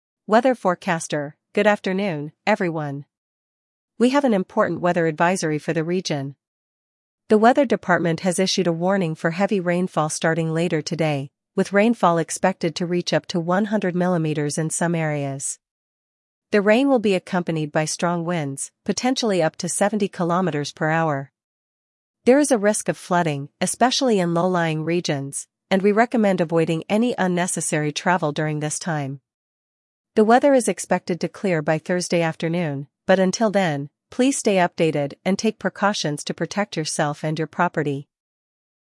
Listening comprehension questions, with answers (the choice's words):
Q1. What weather event is expected?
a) Snowstorm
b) Heatwave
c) Heavy rainfall with strong winds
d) Tornadoes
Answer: Heavy rainfall with strong winds

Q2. What is the expected wind speed?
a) 50 km/h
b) 100 km/h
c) 70 km/h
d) 30 km/h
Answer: 70 km/h

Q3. Which area is at risk during the weather event?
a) High-altitude regions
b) Coastal areas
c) Low-lying areas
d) Urban areas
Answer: Low-lying areas

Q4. When is the weather expected to clear?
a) By Friday afternoon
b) By Wednesday morning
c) By Thursday afternoon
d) By tonight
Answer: By Thursday afternoon

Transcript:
Weather Forecaster: "Good afternoon, everyone. We have an important weather advisory for the region. The weather department has issued a warning for heavy rainfall starting later today, with rainfall expected to reach up to 100 mm in some areas. The rain will be accompanied by strong winds, potentially up to 70 km/h. There is a risk of flooding, especially in low-lying regions, and we recommend avoiding any unnecessary travel during this time. The weather is expected to clear by Thursday afternoon, but until then, please stay updated and take precautions to protect yourself and your property."